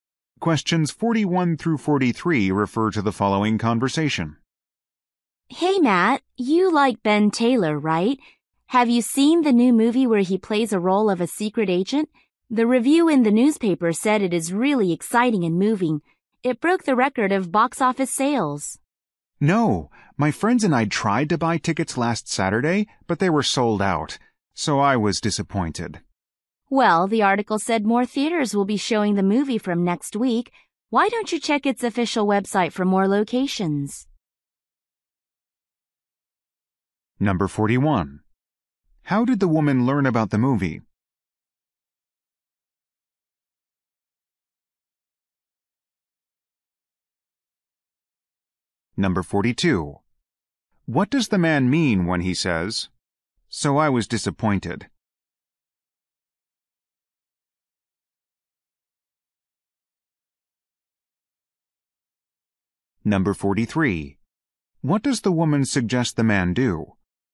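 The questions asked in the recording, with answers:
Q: How did the woman learn about the movie?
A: From a newspaper review

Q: What does the woman suggest the man do?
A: Check the movie's official website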